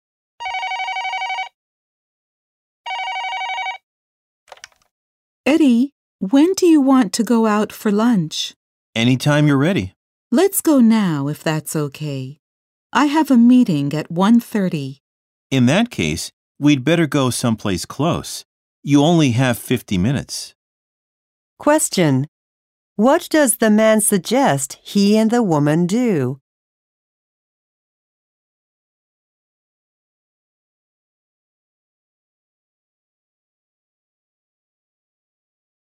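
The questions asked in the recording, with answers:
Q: What does the man suggest he and the woman do?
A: Go somewhere close for lunch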